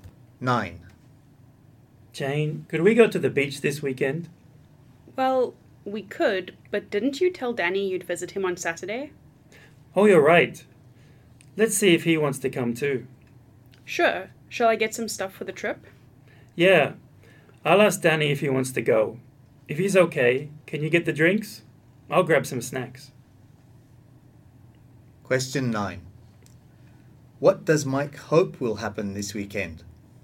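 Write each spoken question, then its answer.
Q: What does Mike hope will happen this weekend?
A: That he and Jane will go to the beach with Danny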